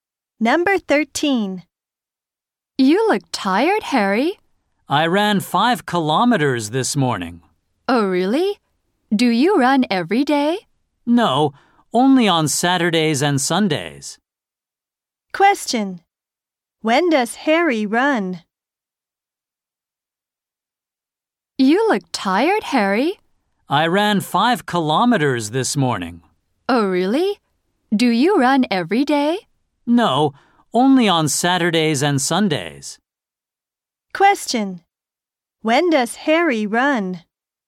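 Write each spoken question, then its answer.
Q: When does Harry run?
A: Only on Saturdays and Sundays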